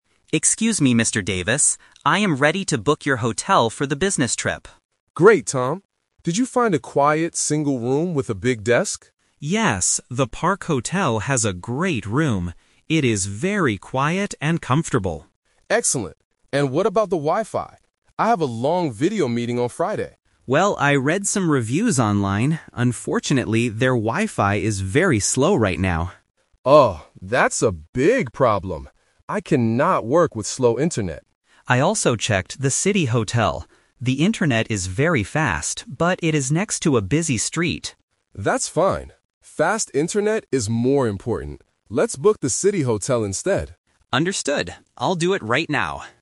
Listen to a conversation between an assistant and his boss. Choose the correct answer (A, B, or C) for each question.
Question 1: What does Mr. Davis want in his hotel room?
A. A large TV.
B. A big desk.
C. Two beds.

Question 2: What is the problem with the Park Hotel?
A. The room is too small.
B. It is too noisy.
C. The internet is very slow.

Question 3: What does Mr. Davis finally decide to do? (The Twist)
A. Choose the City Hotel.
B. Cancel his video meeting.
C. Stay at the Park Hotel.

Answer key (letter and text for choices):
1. B. A big desk.
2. C. The internet is very slow.
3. A. Choose the City Hotel.

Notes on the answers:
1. At the beginning, the boss asks, "Did you find a quiet single room with a big desk?" Trap: Option C is incorrect because he asked for a "single room" (one bed). Option A is a plausible thing to want in a hotel room, but it is never mentioned in the audio.
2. The assistant clearly states the problem: "Unfortunately, their Wi-Fi is very slow right now." Trap: Option B is a trap because the "City Hotel" is next to a busy (noisy) street, but the Park Hotel is actually "very quiet". Option A is not mentioned.
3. This is the Twist. Mr. Davis originally liked the Park Hotel, but because of the bad Wi-Fi, he changes his plan. He says, "Let's book the City Hotel instead." Trap: Option C is what he planned to do at first, but he rejected it. Option B is a plausible reaction to bad internet, but he decides to change hotels, not cancel the meeting.

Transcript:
Assistant: Excuse me, Mr. Davis. I am ready to book your hotel for the business trip.
Boss: Great, Tom. Did you find a quiet single room with a big desk?
Assistant: Yes, the Park Hotel has a great room. It is very quiet and comfortable.
Boss: Excellent. And what about the Wi-Fi? I have a long video meeting on Friday.
Assistant: Well, I read some reviews online. Unfortunately, their Wi-Fi is very slow right now.
Boss: Oh, that's a big problem. I cannot work with slow internet.
Assistant: I also checked the City Hotel. The internet is very fast, but it is next to a busy street.
Boss: That's fine. Fast internet is more important. Let's book the City Hotel instead.